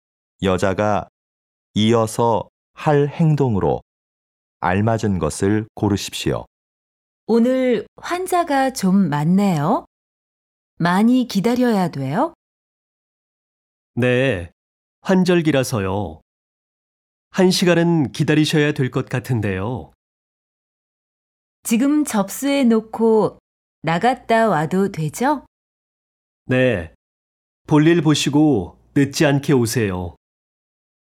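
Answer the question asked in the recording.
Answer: 접수를 한다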